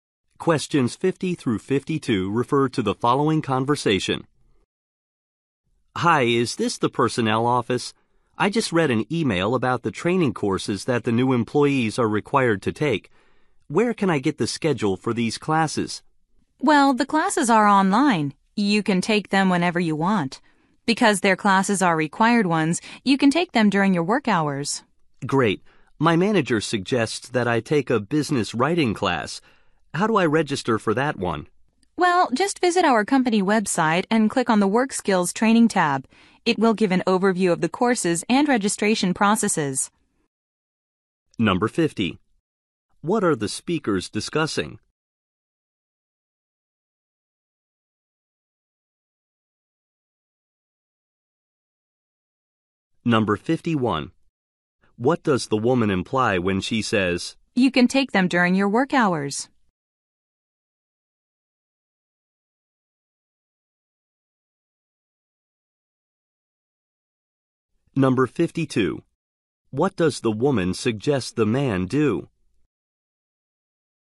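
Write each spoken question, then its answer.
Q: What are the speakers discussing?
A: Training courses for new employees

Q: What does the woman suggest the man do?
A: Visit the company website to register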